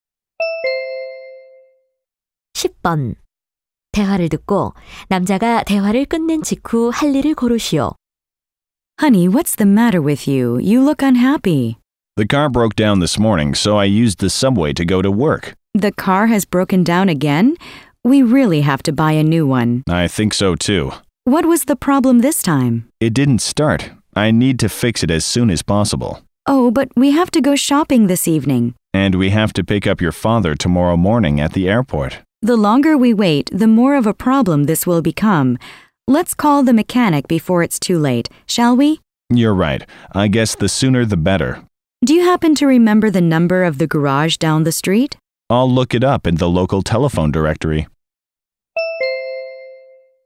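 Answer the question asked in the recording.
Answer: 전화번호부에서 정비소 번호 찾기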